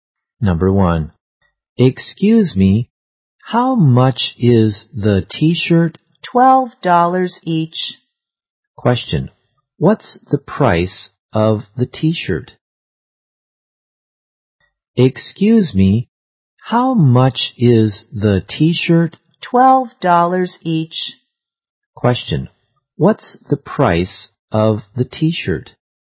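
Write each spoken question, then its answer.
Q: Question. What's the price of the t-shirt?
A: $12.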